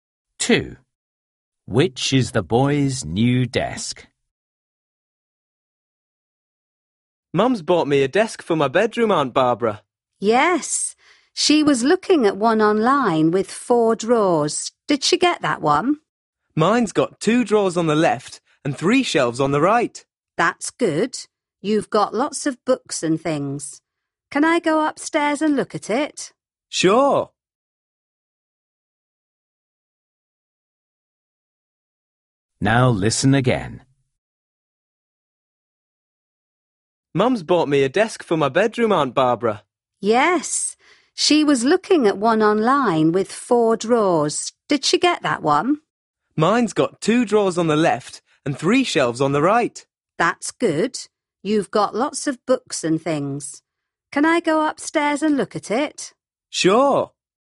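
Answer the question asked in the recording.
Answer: The one with two drawers on the left and three shelves on the right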